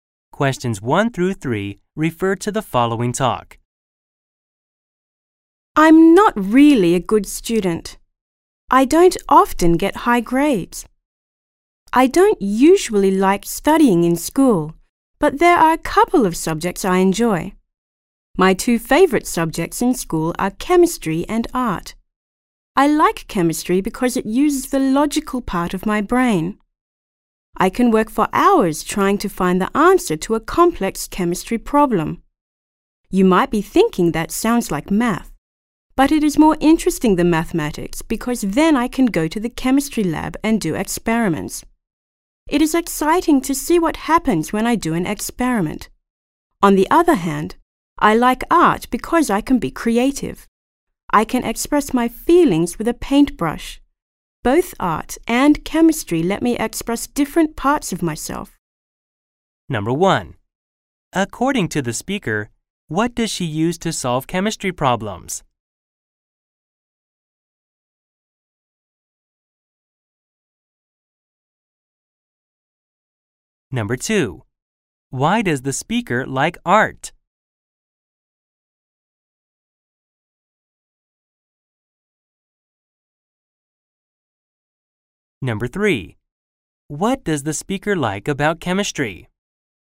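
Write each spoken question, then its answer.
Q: According to the speaker, what does she use to solve chemistry problems?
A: The logical part of her brain

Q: Why does the speaker like art?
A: She can be creative and express her feelings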